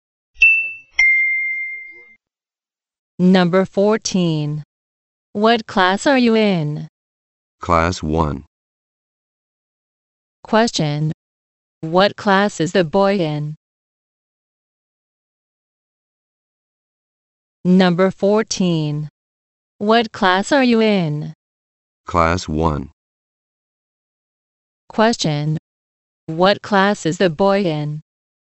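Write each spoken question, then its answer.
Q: Question. What class is the boy in?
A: Class 1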